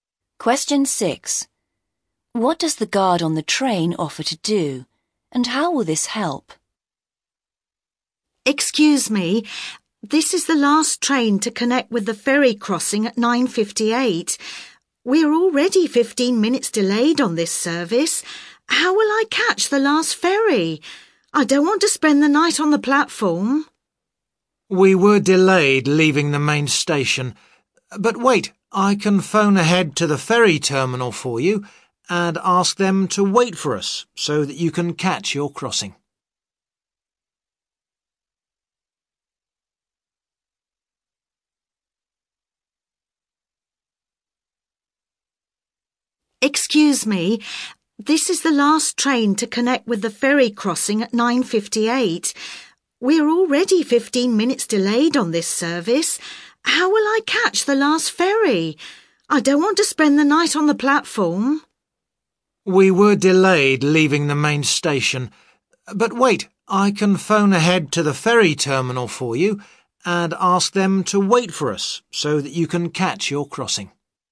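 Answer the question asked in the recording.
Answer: Phone ahead to the ferry terminal and ask them to wait, so the passenger can catch the crossing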